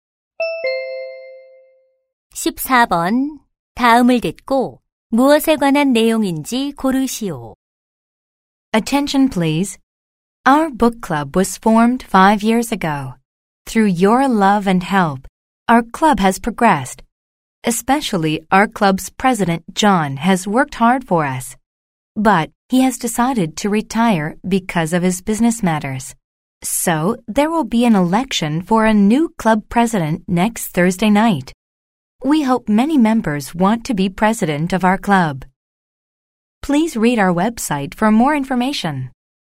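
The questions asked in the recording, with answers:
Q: 다음을 듣고 무엇에 관한 내용인지 고르시오.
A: 새 클럽 회장 선거 안내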